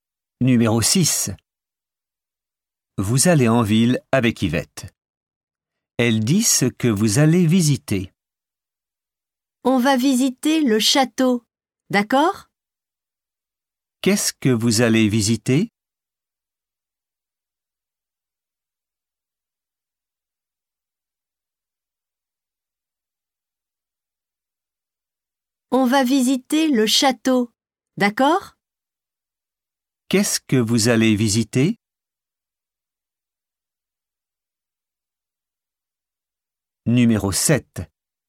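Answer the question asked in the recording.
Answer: Le château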